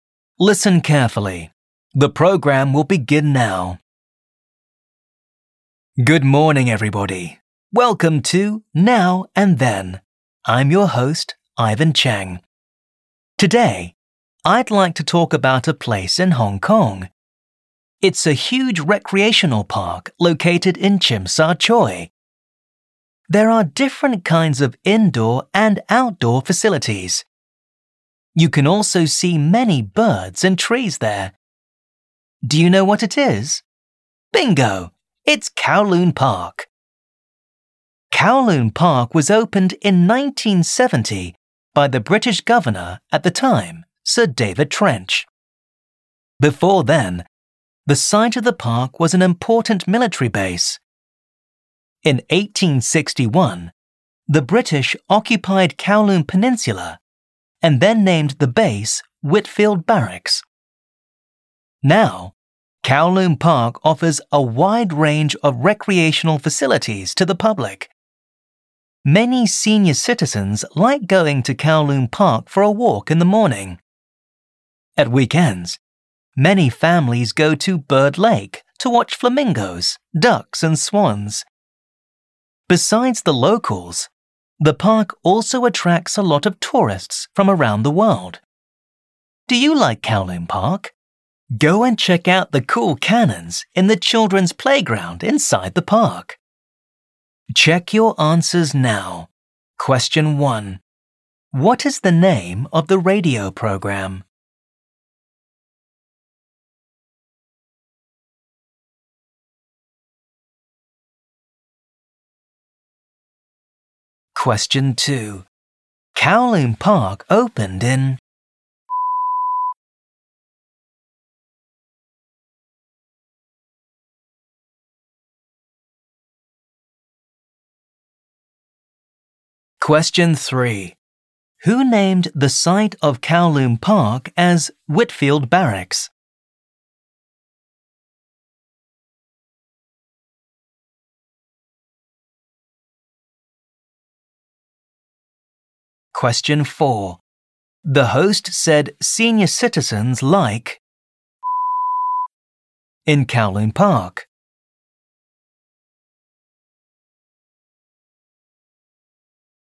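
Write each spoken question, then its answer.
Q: What is the name of the radio program?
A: Now and Then

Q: Kowloon Park opened in...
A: 1970

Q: Who named the site of Kowloon Park as Whitfield Barracks?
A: The British

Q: The host said senior citizens like in Kowloon Park.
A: going for a walk in the morning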